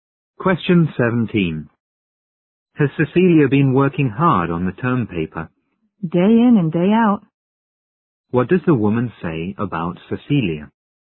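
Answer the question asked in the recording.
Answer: She has been working hard on it every day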